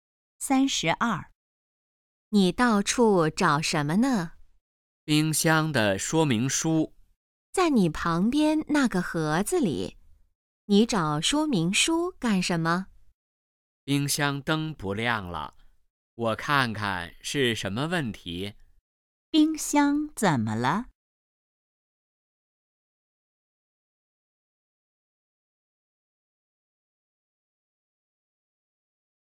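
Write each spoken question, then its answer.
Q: 冰箱怎么了?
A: 灯不亮了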